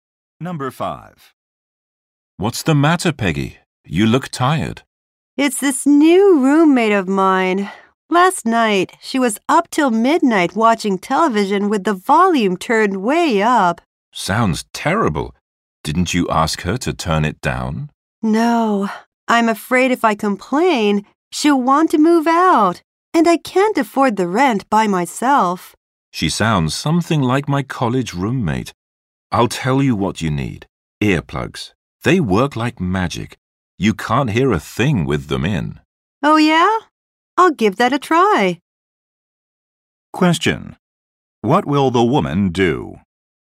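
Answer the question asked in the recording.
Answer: Try using earplugs.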